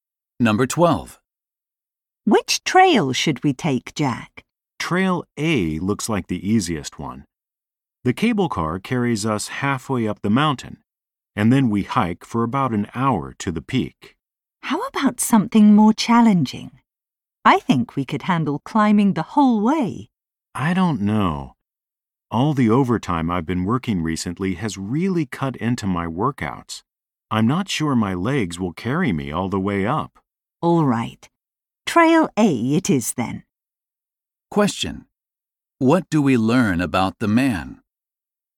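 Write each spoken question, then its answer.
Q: Question: What do we learn about the man?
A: He has been working so much overtime that he hasn't been working out, so he isn't sure he can climb the whole way.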